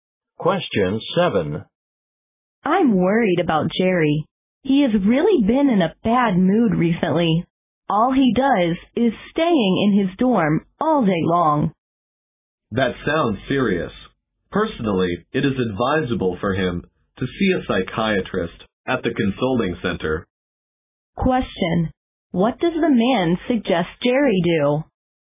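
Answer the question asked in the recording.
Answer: See a psychiatrist at the consulting center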